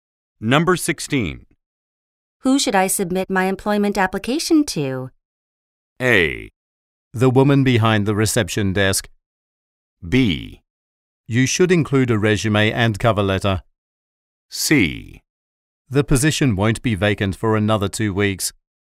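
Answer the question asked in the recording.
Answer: A: The woman behind the reception desk.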